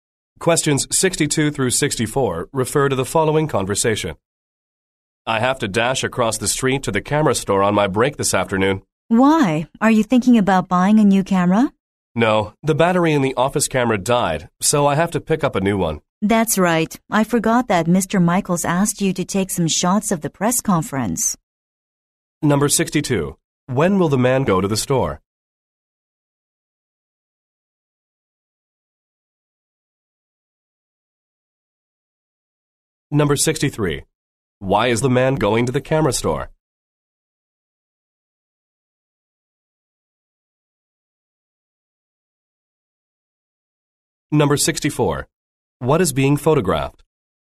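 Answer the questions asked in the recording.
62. On his break this afternoon
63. To buy a new battery for the office camera
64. The press conference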